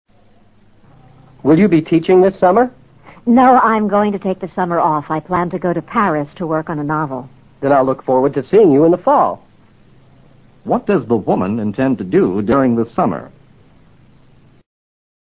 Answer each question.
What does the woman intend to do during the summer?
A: She plans to write a book.